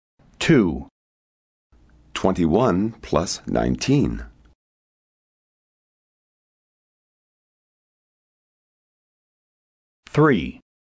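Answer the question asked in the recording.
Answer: 40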